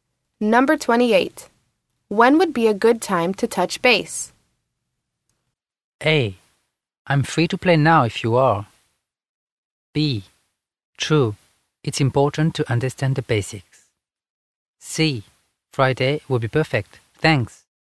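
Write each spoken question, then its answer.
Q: When would be a good time to touch base?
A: C: Friday will be perfect.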